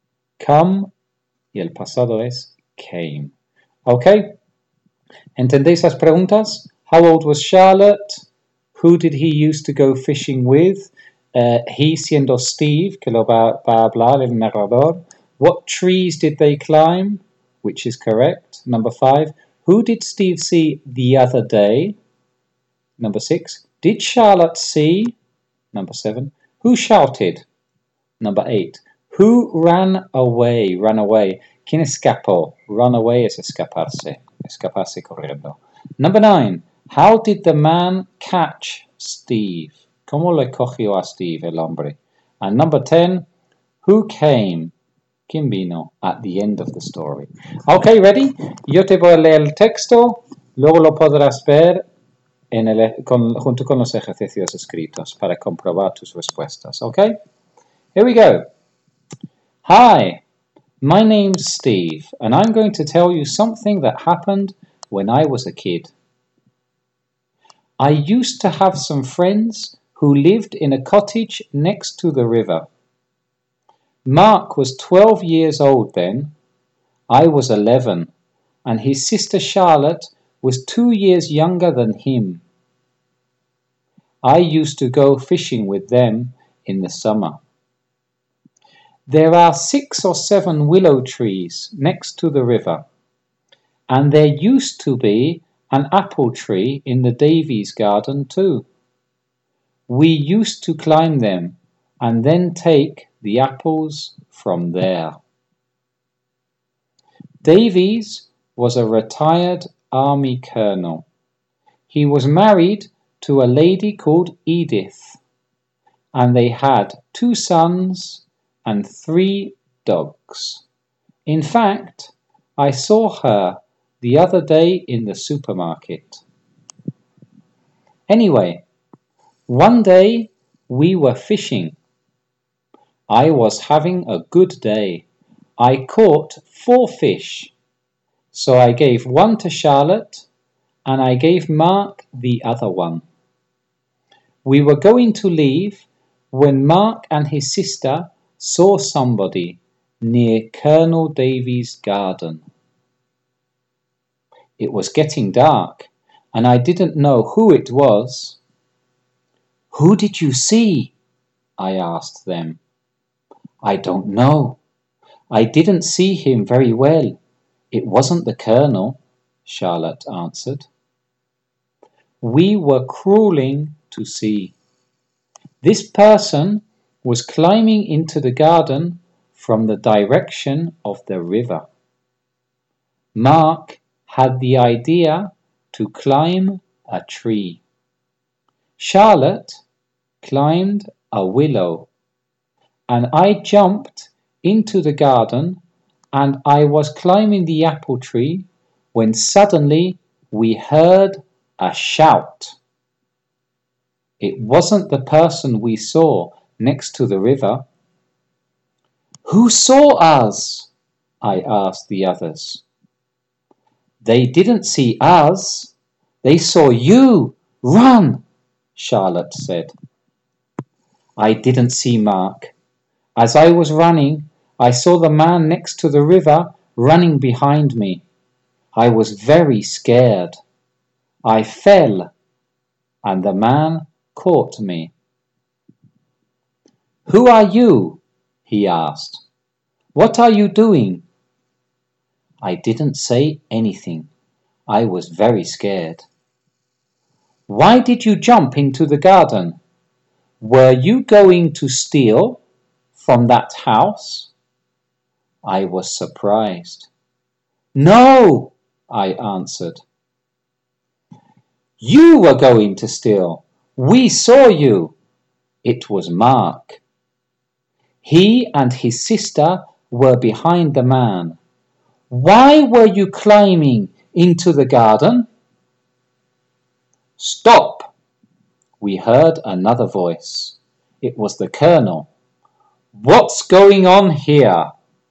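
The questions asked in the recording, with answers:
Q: How old was Charlotte?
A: 10 years old

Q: Who did he used to go fishing with?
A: Mark and his sister Charlotte

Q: What trees did they climb?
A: The willow trees and the apple tree

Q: Who did Steve see the other day?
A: Edith, the colonel's wife

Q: How did the man catch Steve?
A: Steve fell and the man caught him

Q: Who came?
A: The colonel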